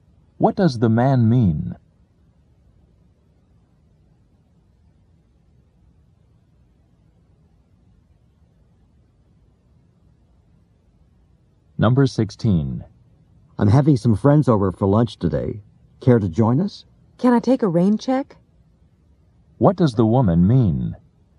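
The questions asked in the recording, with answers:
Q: What does the woman mean?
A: She can't come today but would like to another time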